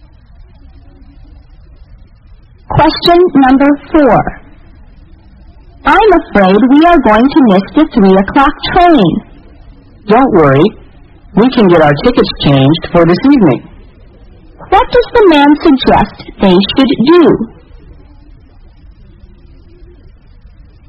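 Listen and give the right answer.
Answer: Change their tickets for a train this evening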